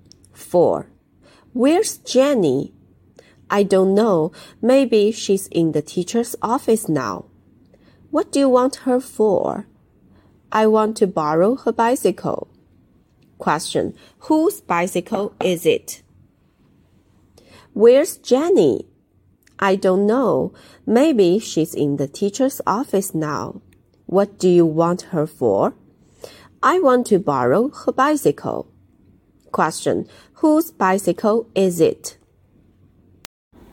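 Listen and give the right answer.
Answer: Jenny's.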